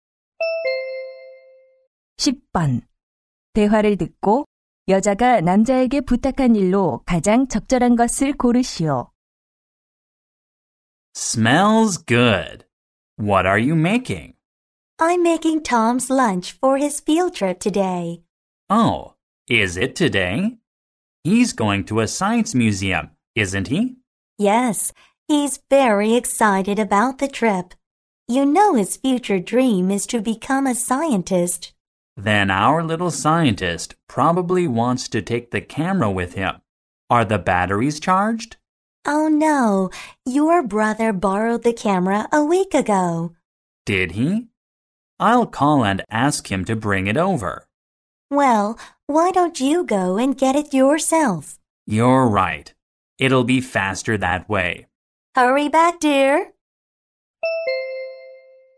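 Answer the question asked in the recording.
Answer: 남자의 동생(형)에게서 카메라 가져오기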